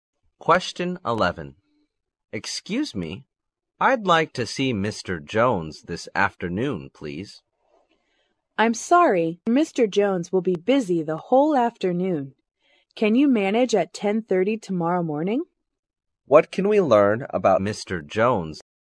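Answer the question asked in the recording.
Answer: He will be busy the whole afternoon.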